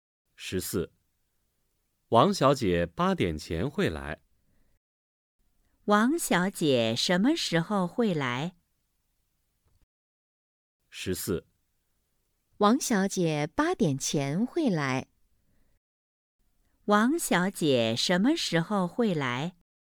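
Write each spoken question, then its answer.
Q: 王小姐什么时候会来?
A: 八点前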